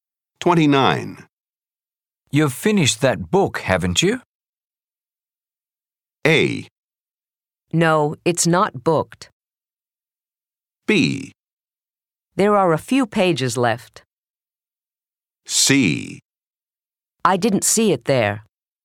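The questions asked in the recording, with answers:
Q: You've finished that book, haven't you?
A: B: There are a few pages left.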